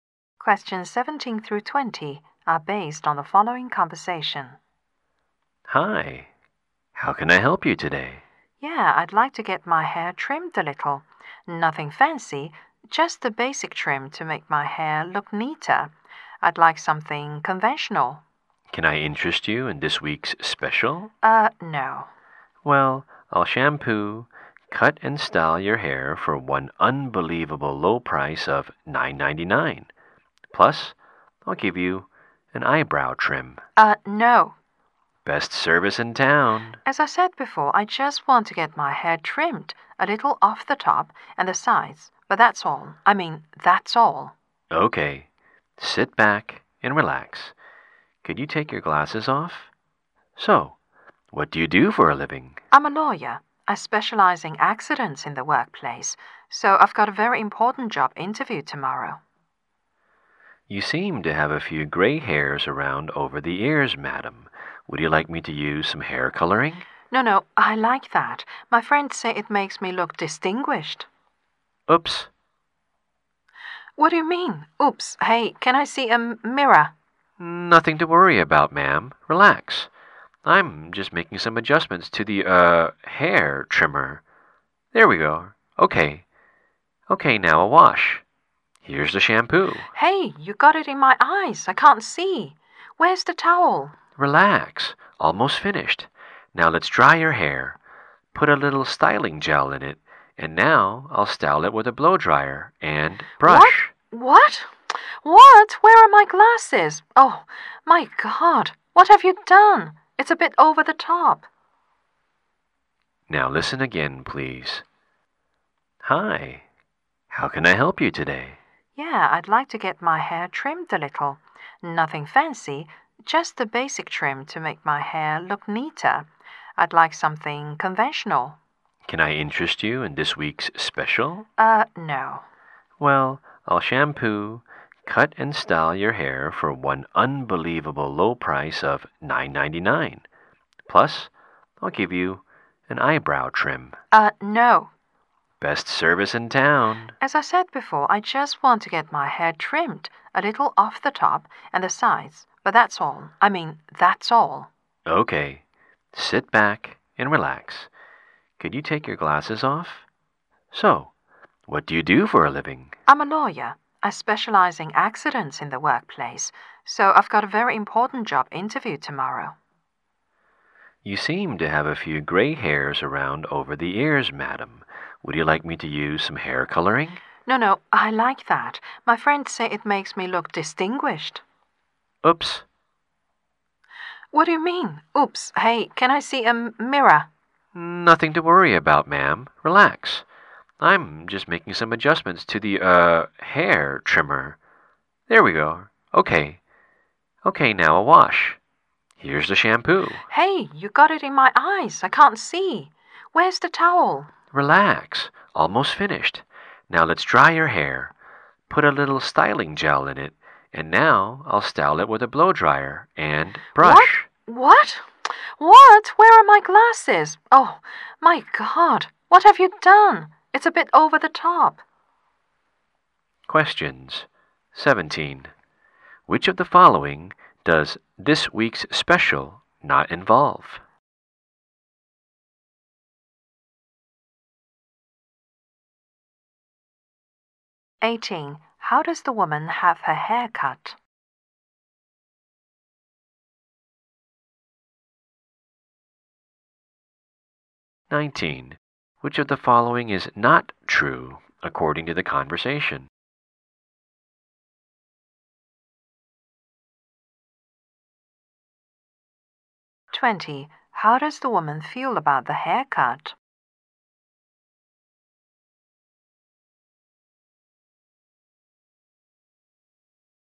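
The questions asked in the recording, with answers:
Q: How does the woman feel about the haircut?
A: Shocked and unhappy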